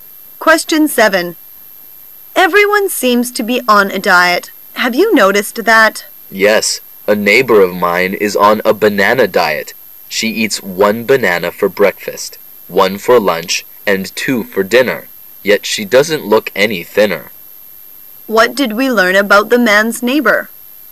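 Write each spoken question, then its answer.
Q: What did we learn about the man's neighbor?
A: She eats only bananas on her diet but hasn't lost weight.

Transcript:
[解析] W: Everyone seems to be on a diet. Have you noticed that? M: Yes, a neighbor of mine is on a banana diet. She eats one banana for breakfast, one for lunch, and two for dinner, yet she doesn't look any thinner. Q: What did we learn about the man's neighbor?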